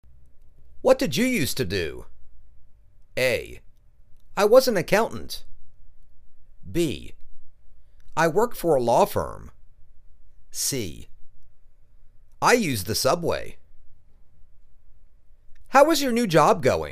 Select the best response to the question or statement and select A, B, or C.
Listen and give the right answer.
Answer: I was an accountant.